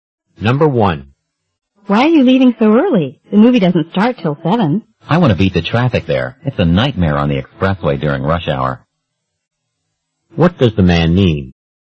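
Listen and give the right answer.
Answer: He wants to leave early to avoid the rush-hour traffic.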